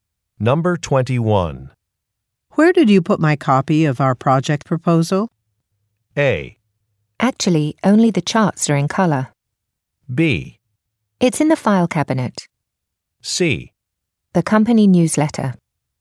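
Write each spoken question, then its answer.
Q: Where did you put my copy of our project proposal?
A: B: It's in the file cabinet.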